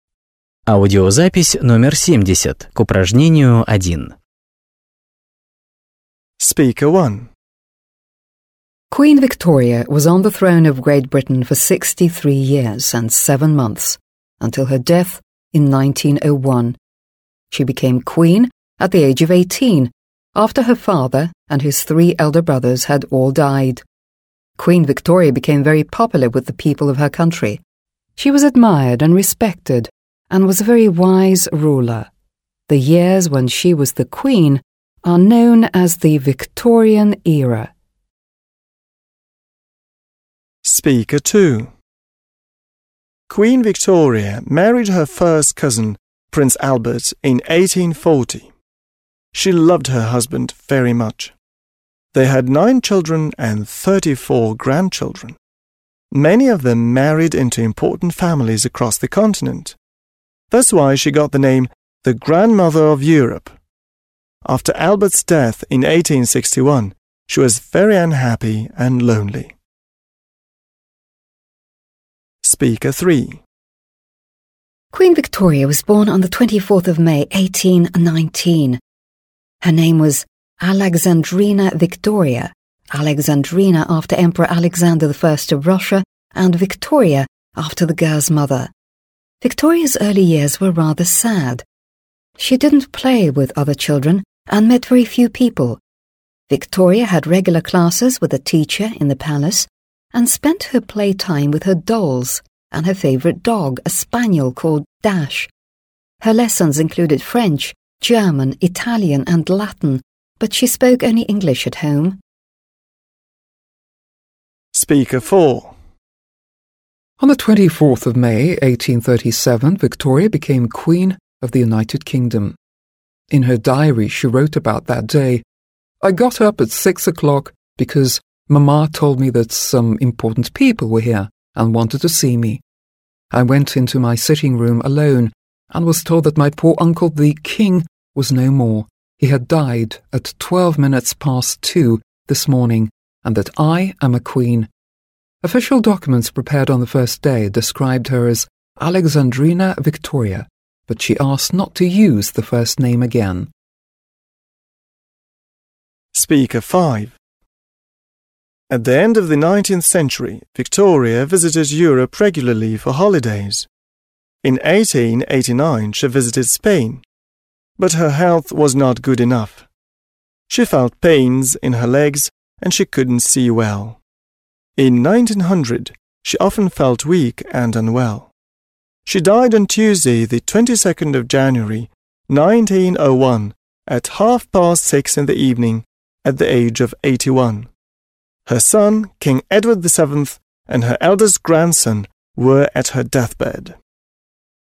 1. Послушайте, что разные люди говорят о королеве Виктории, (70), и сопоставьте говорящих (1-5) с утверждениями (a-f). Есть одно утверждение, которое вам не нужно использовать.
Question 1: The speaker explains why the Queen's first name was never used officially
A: 4

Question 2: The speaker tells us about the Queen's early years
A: 3

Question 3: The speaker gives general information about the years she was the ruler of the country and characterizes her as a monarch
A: 1

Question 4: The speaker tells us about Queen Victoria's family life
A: 2

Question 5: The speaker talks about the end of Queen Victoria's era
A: 5

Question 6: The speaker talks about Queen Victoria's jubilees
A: extra

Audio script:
Speaker 1
Queen Victoria was on the throne of Great Britain for 63 years and seven months until her death in 1901. She became queen at the age of 18 after her father and his three elder brothers had all died. Queen Victoria became very popular with the people of her country. She was admired and respected and was a very wise ruler. The years when she was the queen are known as the Victorian Era.
Speaker 2
Queen Victoria married her first cousin, Prince Albert, in 1840. She loved her husband very much. They had nine children and 34 grandchildren. Many of them married into important families across the continent. That's why she got the name «the grandmother of Europe». After Albert's death in 1861 she was very unhappy and lonely.
Speaker 3
Queen Victoria was born on the 24th of May 1819. Her name was Alexandrina Victoria (Alexandrina after Emperor Alexander I of Russia and Victoria after the girl's mother). Victoria's early years were rather sad. She didn't play with other children and met very few people. Victoria had regular classes with a teacher in the palace, spent her play hours with her dolls and her favourite dog, a spaniel called Dash. Her lessons included French, German , Italian and Latin, but she spoke only English at home.
Speaker 4
On the 24th of May, 1837, Victoria became Queen of the United Kingdom. In her diary she wrote about that day: "I got up at 6 o'clock because Mamma told me that some important people were here and wanted to see me. I went into my sitting room alone and was told that my poor Uncle, the King, was no more, he had died at 12 minutes past 2 this morning and that I am a Queen." Official documents prepared on the first day described her as Alexandrina Victoria but she asked not to use the first name again.
Speaker 5
At the end of the 19th century Victoria visited Europe regularly for holidays. In 1889 she visited Spain. But her health was not good enough. She felt pains in her legs and she couldn't see well. In 1900 she often felt weak and unwell. She died on Tuesday 22 January, 1901, at half past six in the evening, at the age of 81. Her son, King Edward VII, and her eldest grandson were at her death bed.

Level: 8 класс